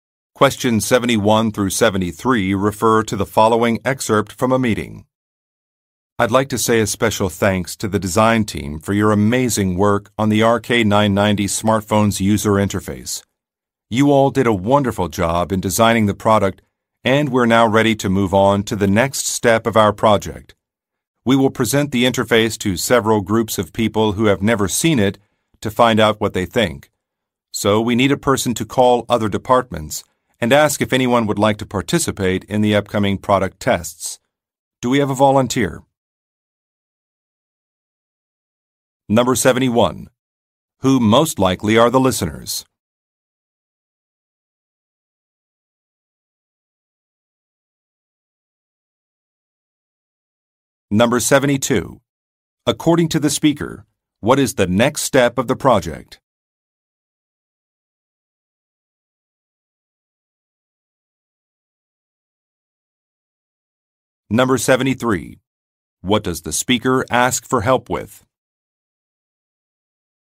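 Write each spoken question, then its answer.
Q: Who most likely are the listeners?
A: The design team for the RK990 smartphone's user interface

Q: According to the speaker, what is the next step of the project?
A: Presenting the interface to groups of people who have never seen it to get their opinions (product tests)

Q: What does the speaker ask for help with?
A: Calling other departments to find participants for the product tests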